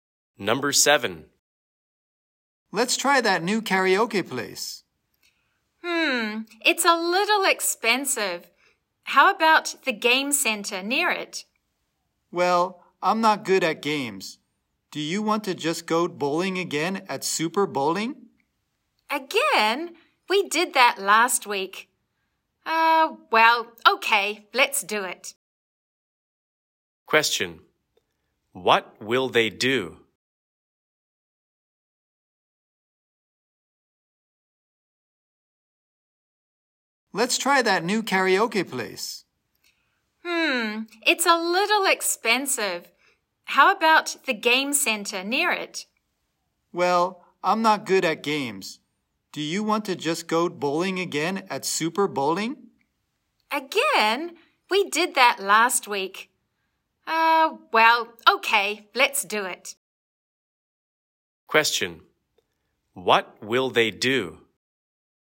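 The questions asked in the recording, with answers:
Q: What will they do?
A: Go bowling at Super Bowling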